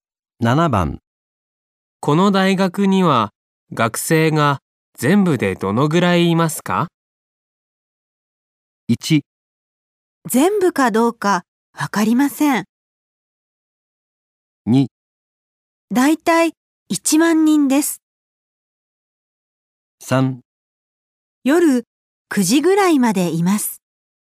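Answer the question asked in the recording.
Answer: 2: だいたい1万人です。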